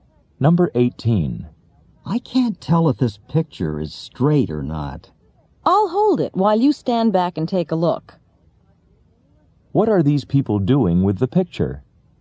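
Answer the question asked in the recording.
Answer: Checking whether it is hanging straight.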